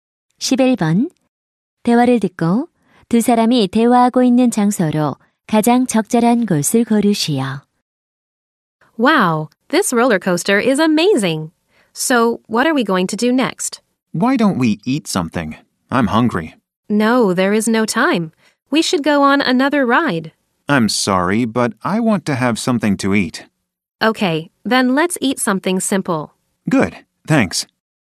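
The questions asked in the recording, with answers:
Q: 대화를 듣고 두 사람이 대화하고 있는 장소로 가장 적절한 곳을 고르시오.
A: 놀이공원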